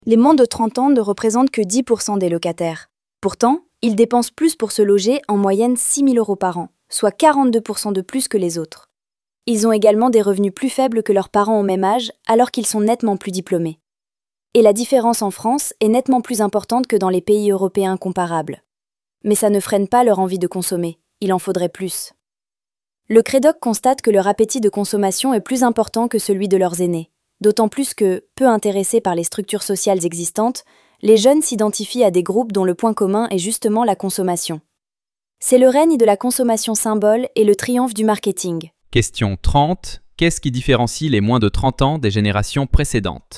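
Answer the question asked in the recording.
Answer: Ils ont un plus grand appétit de consommation.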